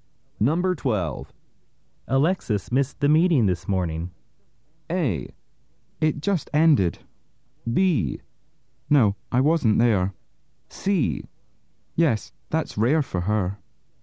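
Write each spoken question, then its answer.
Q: Alexis missed the meeting this morning.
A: C: Yes, that's rare for her.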